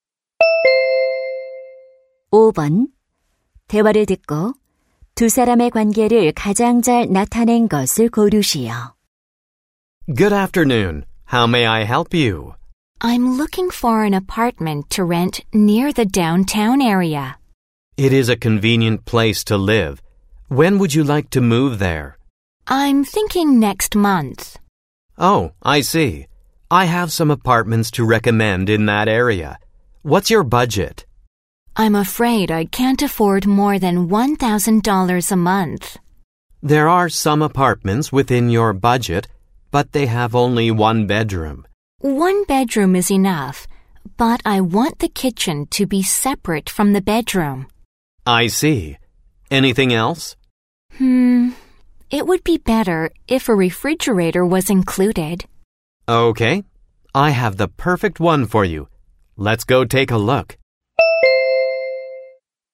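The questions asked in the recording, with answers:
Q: 대화를 듣고 두 사람의 관계를 가장 잘 나타낸 것을 고르시오.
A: 부동산 중개인 - 고객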